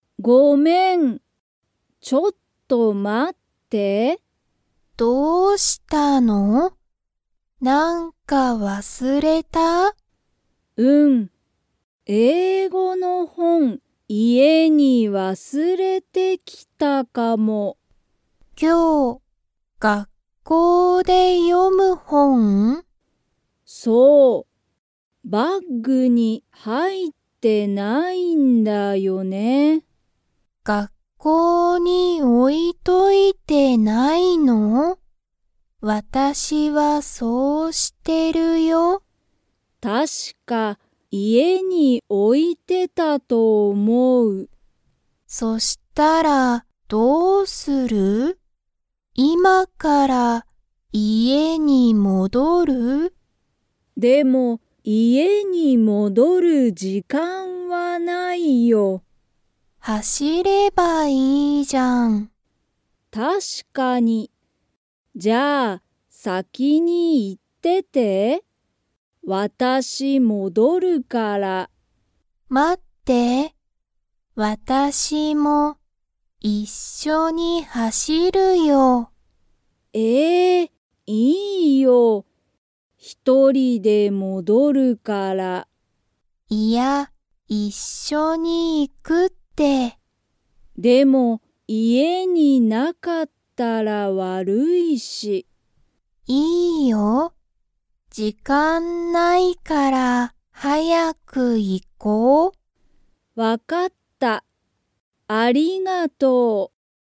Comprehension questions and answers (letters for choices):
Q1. その本(ほん)は、今日学校(きょうがっこう)で読(よ)む本(ほん)ですか?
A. はい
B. いいえ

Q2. リナは、本(ほん)を____に置(お)いている。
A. 家(いえ)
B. 時間(じかん)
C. バッグ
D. 学校がっこう)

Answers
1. A
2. D

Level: Level 2